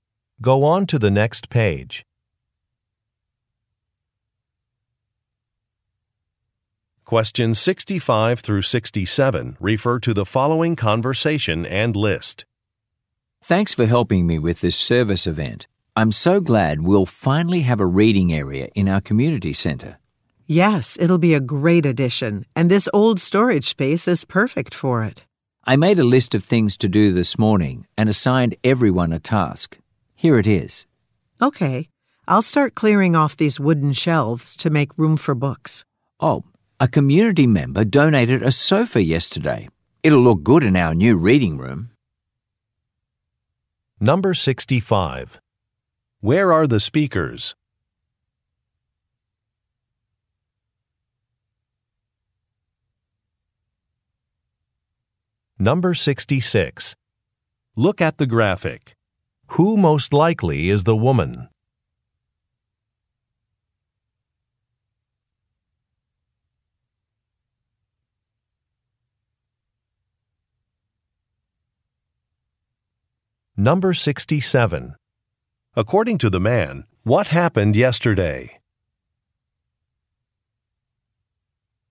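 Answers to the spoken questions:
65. At a community center
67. A sofa was donated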